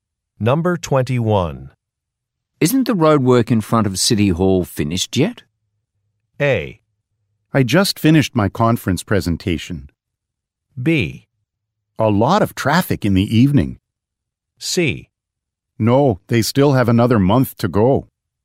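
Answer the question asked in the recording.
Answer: C: No, they still have another month to go.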